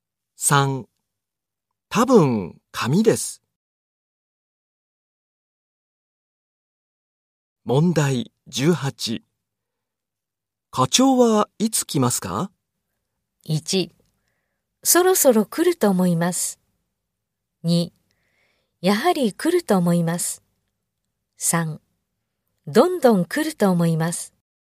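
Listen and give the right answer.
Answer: 1: そろそろ来ると思います。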